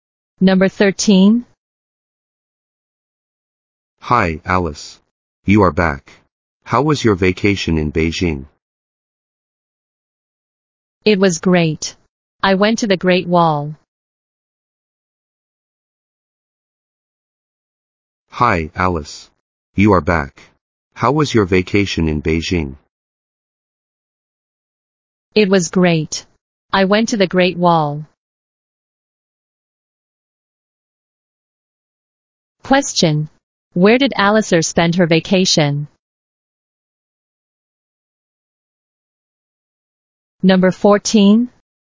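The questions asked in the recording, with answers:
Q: Where did Alistair spend her vacation?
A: In Beijing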